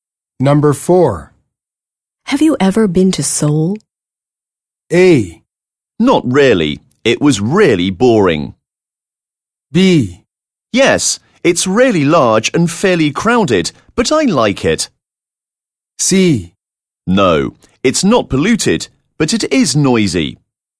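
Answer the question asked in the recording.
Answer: B: Yes, it's really large and fairly crowded, but I like it.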